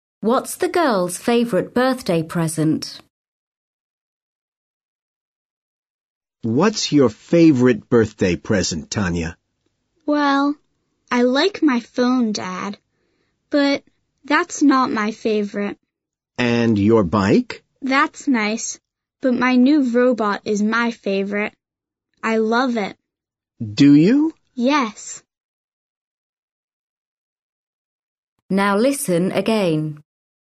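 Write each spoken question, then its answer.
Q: What's the girl's favorite birthday present?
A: her new robot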